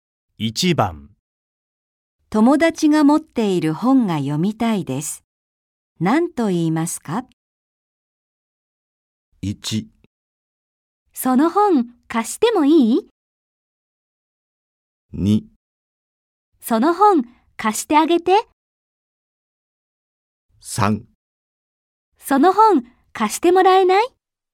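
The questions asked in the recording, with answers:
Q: 友達が持っている本が読みたいです。何と言いますか?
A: 3: その本、貸してもらえない?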